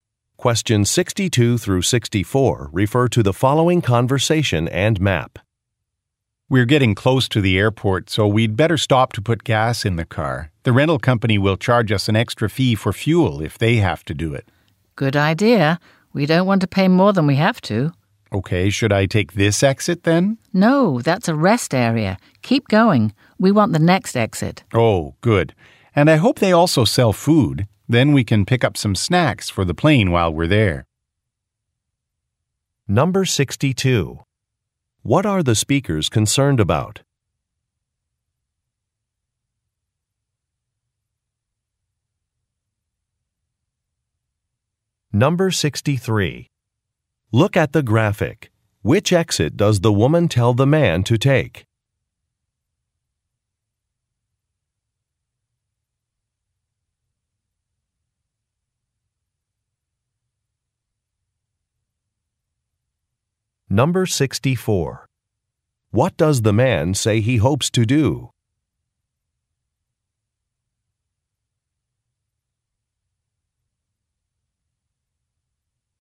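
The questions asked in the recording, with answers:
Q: What are the speakers concerned about?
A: Paying an extra fuel fee to the rental company

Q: What does the man say he hopes to do?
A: Buy snacks for the plane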